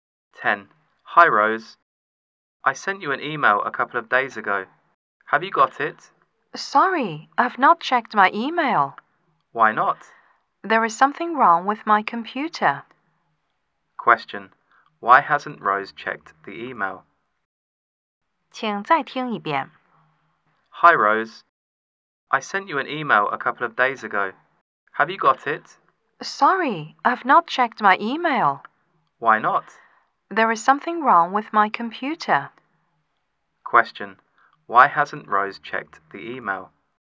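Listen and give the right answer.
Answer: Something is wrong with her computer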